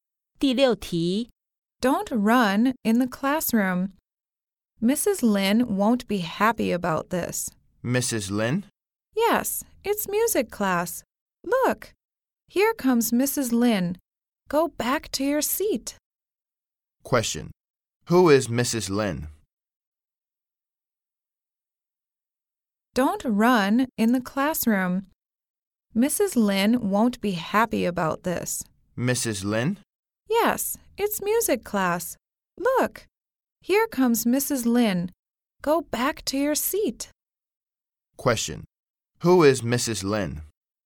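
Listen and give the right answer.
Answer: The music teacher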